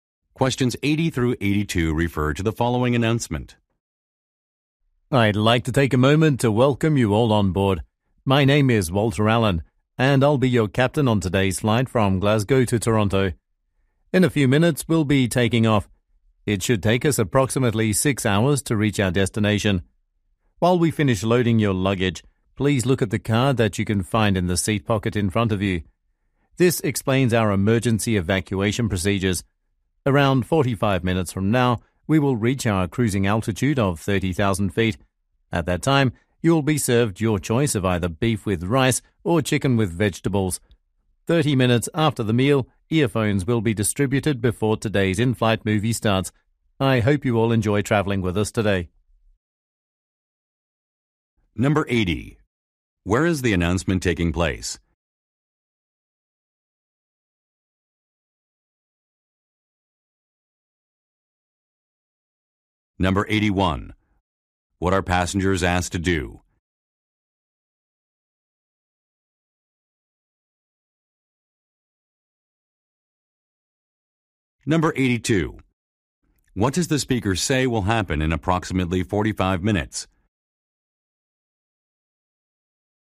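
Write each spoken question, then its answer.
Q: Where is the announcement taking place?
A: On an airplane

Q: What are passengers asked to do?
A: Read the emergency procedures card in the seat pocket

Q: What does the speaker say will happen in approximately 45 minutes?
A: The plane will reach cruising altitude and a meal will be served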